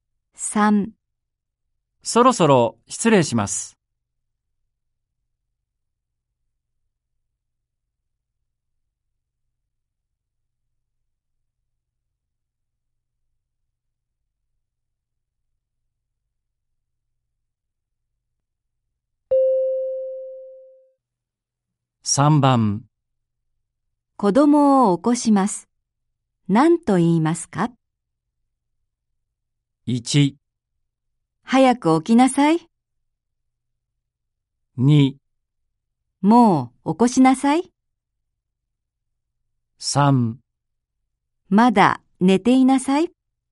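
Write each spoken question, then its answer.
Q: 子供を起こします。何と言いますか?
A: 1: 早く起きなさい。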